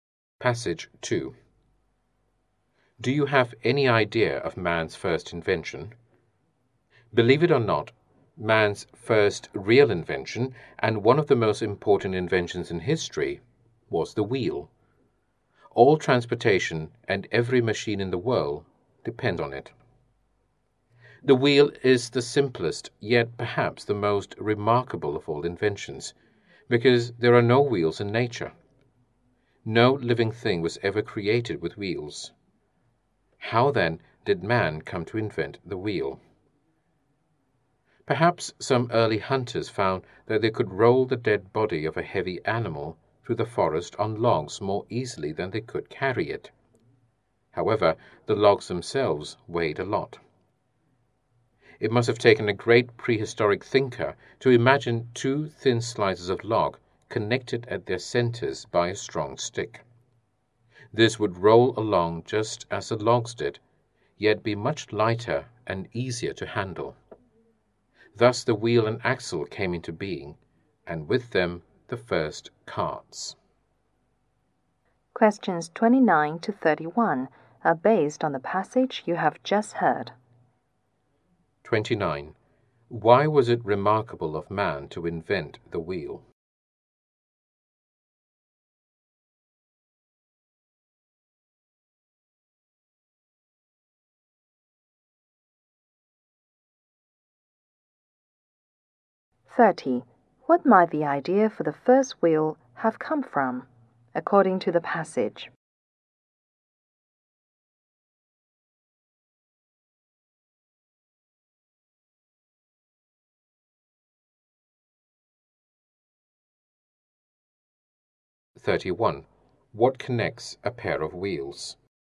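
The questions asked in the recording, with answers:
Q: Why was it remarkable of man to invent the wheel?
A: There are no wheels in nature.

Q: What might the idea for the first wheel have come from, according to the passage?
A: Rolling heavy dead animals on logs

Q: What connects a pair of wheels?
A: A strong stick (an axle)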